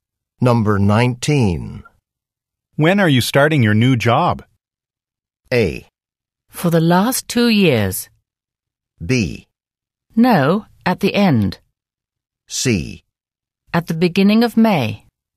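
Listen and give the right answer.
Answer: C: At the beginning of May.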